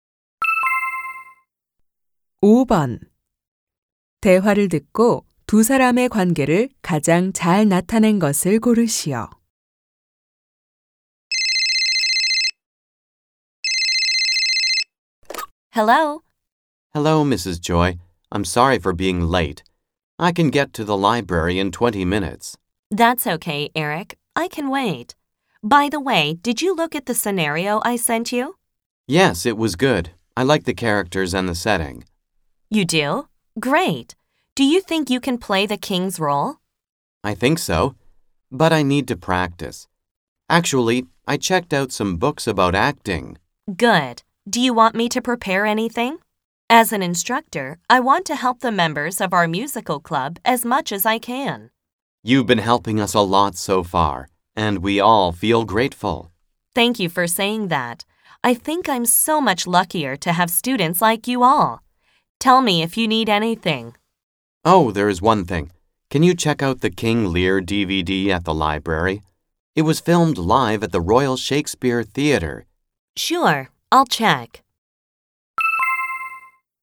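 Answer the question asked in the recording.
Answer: 뮤지컬 동아리 지도교사 – 학생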